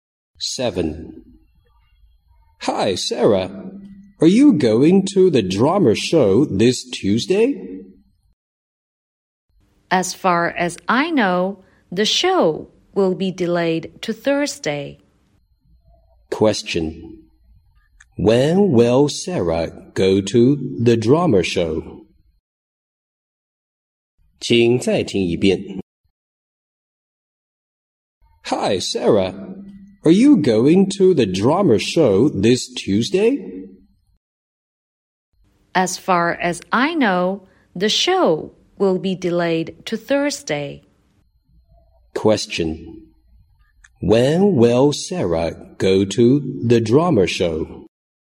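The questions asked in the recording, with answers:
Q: When will Sarah go to the drama show?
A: On Thursday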